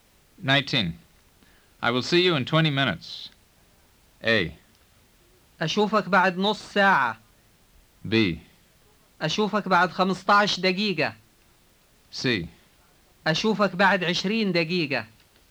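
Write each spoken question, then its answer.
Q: I will see you in 20 minutes.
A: C: أشوفك بعد 20 دقيقة.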